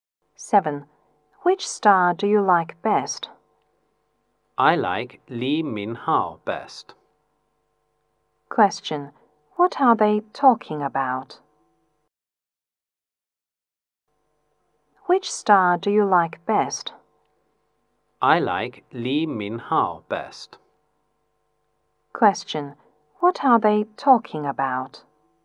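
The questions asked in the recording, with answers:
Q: What are they talking about?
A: Their favorite star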